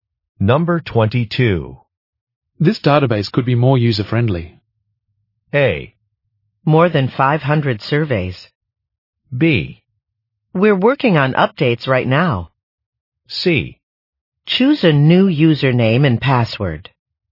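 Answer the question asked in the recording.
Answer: B: We're working on updates right now.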